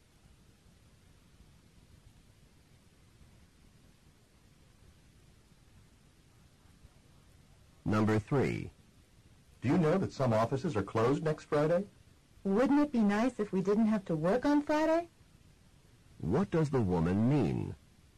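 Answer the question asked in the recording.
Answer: They have to work on Friday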